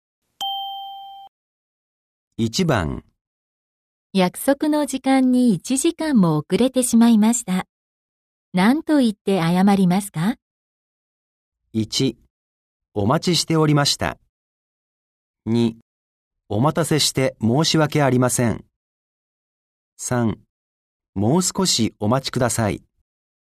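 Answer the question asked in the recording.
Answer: 2: お待たせして申し訳ありません。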